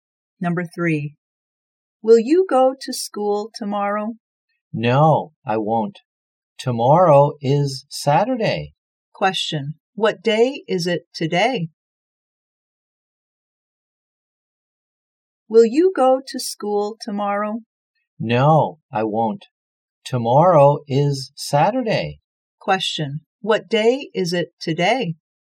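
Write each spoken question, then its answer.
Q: What day is it today?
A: Friday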